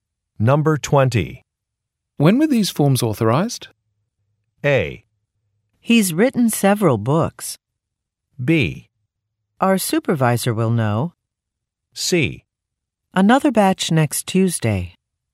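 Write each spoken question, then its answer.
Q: When were these forms authorized?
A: B: Our supervisor will know.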